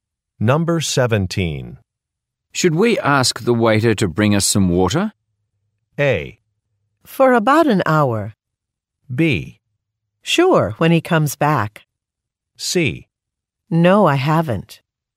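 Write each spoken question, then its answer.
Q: Should we ask the waiter to bring us some water?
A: B: Sure, when he comes back.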